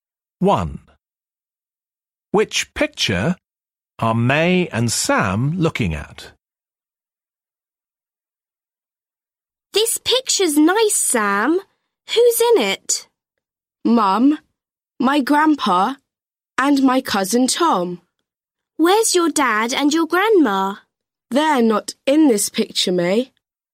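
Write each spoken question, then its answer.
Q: Which picture are May and Sam looking at?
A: The one with Sam's mum, grandpa and cousin Tom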